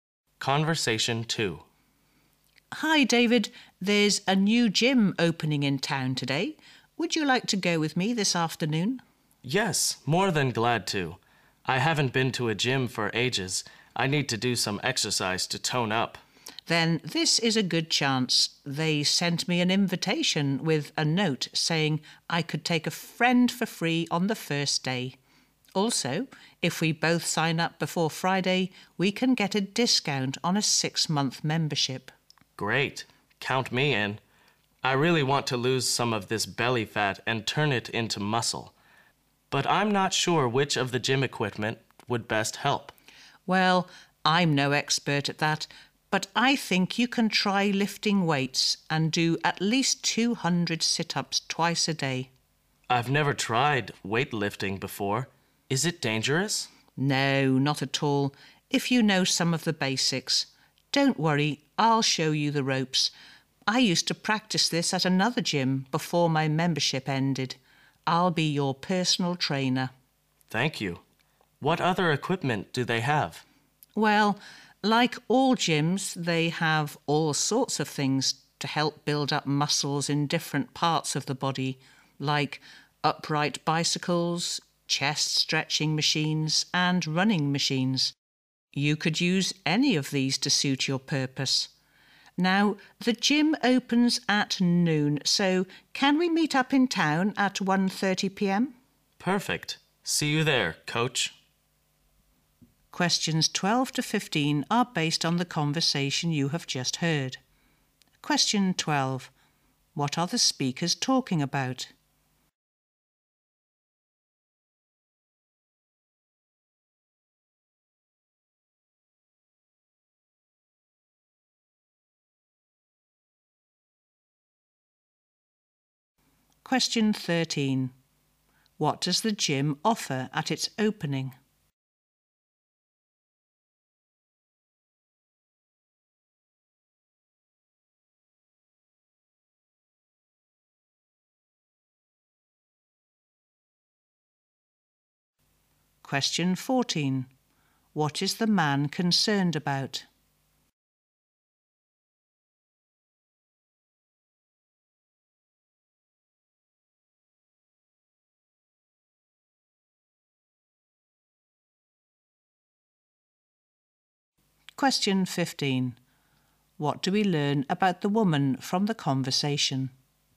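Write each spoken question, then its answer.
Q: What are the speakers talking about?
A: Going to a new gym

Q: What does the gym offer at its opening?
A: Free entry for a friend on the first day and a membership discount

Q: What do we learn about the woman from the conversation?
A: She used to practice weightlifting at another gym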